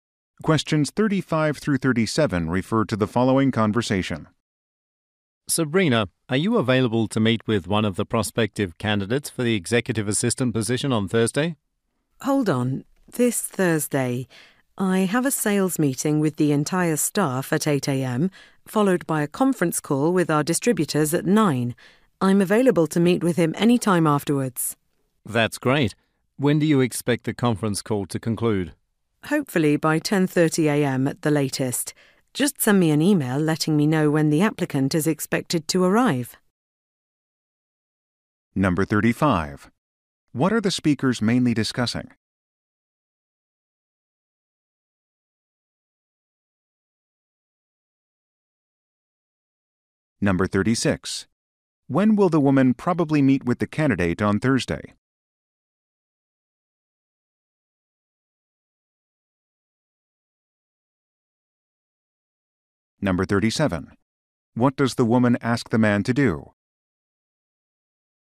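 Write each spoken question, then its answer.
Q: What are the speakers mainly discussing?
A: A meeting with a job candidate

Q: When will the woman probably meet with the candidate on Thursday?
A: After 10:30 a.m.

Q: What does the woman ask the man to do?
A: Email her the applicant's arrival time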